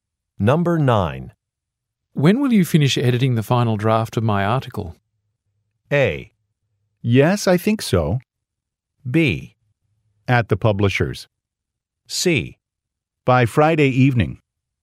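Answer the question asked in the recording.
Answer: C: By Friday evening.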